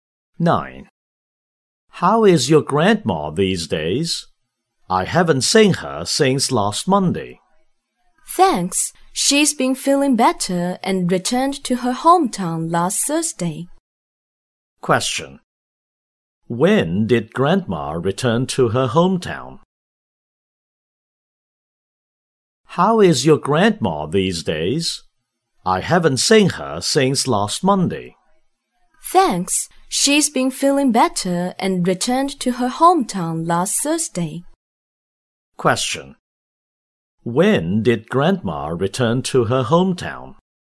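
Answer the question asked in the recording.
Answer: Last Thursday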